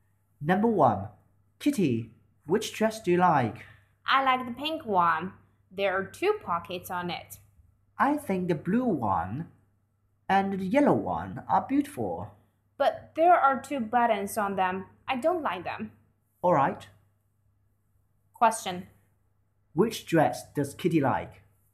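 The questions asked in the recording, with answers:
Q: Which dress does Kitty like?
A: The pink one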